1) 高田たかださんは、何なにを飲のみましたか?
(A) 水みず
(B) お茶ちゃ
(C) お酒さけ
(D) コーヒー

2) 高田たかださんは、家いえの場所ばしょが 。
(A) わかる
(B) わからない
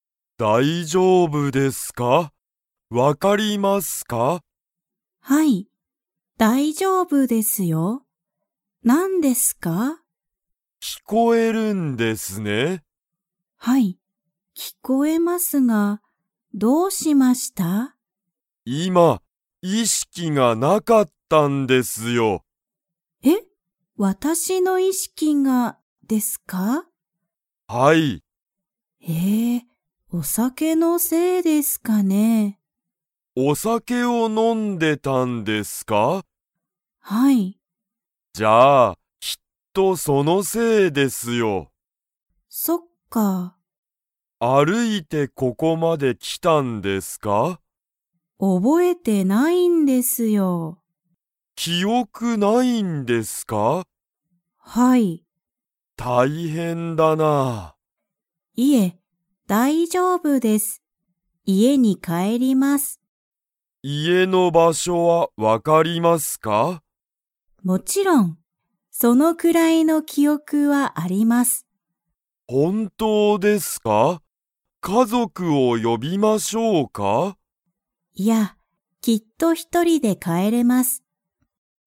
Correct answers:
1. お酒さけ
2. わかる

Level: Level 3

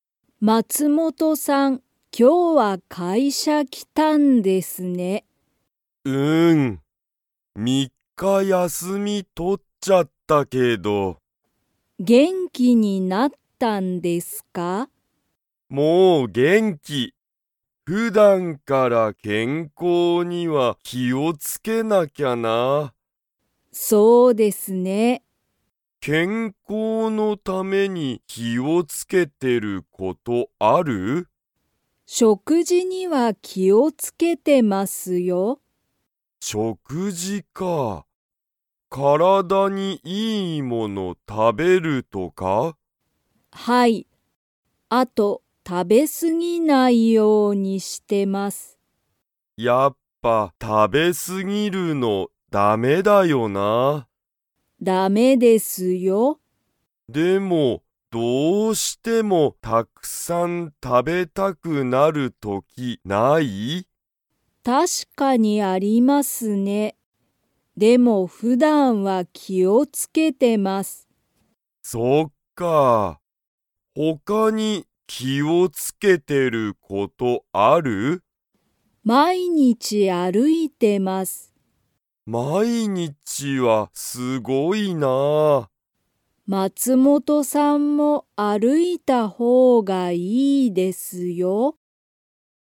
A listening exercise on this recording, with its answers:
Comprehension Quiz (Skip if you don't understand the conversation yet)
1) 佐藤さとうさんは、普段ふだんから何なにに気きを付つけてますか?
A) 仕事しごと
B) 勉強べんきょう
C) 友達ともだち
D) 食事しょくじ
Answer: 食事しょくじ

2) 佐藤さとうさんは、毎日まいにち 。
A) 歩あるいてる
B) 歩あるいてない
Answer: 歩あるいてる

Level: Level 3

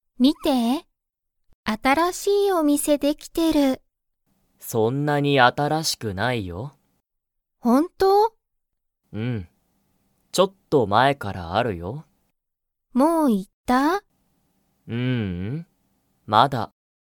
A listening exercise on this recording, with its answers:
そのお店みせは____ある。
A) 新あたらしく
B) そんなに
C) ちょっと前まえから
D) もう少すこし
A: ちょっと前まえから

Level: Level 1

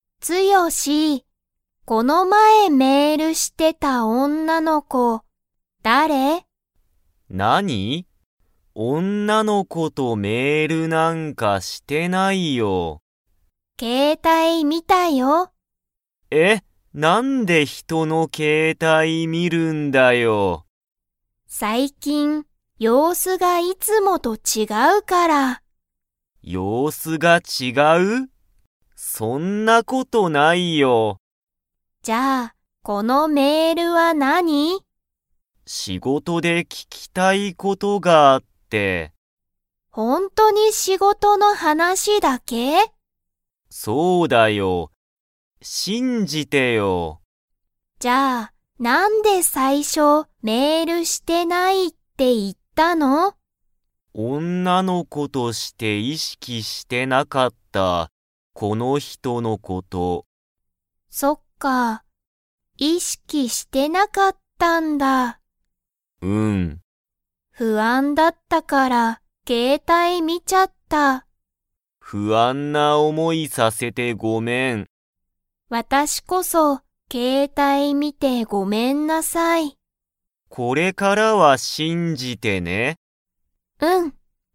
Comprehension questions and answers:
Comprehension Quiz (Skip if you don't understand the conversation yet)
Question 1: つよしは、女おんなの子こと の話はなしをした。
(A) デート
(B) メール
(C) 仕事しごと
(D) 不安ふあん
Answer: 仕事しごと

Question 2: けいこは、これからつよしを信しんじますか?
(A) はい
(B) いいえ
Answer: はい

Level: Level 3

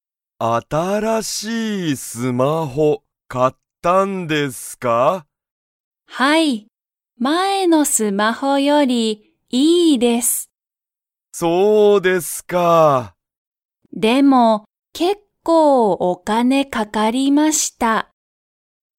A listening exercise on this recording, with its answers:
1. 新(あたら)しいスマホは、結構けっこう____がかかった。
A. 時間じかん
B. 仕事しごと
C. 電話でんわ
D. お金かね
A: お金かね

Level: Level 1

